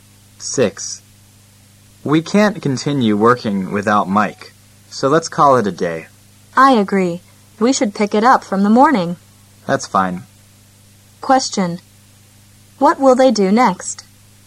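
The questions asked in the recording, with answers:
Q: What will they do next?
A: Stop working for the day and continue in the morning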